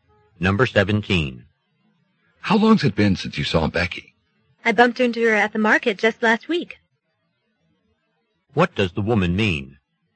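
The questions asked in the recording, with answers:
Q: What does the woman mean?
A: She saw Becky last week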